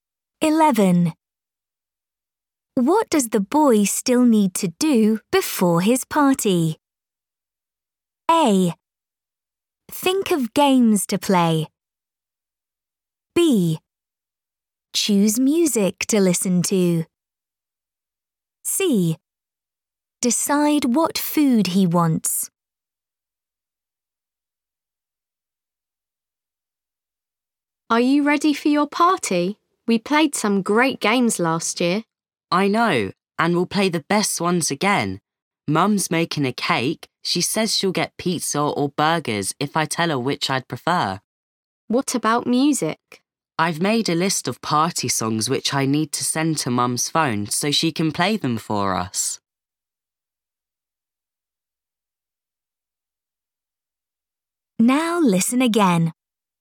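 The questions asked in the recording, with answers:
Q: What does the boy still need to do before his party?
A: C: Decide what food he wants.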